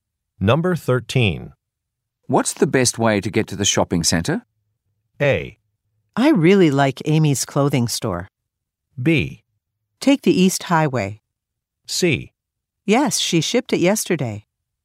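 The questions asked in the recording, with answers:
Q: What's the best way to get to the shopping center?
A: B: Take the East Highway.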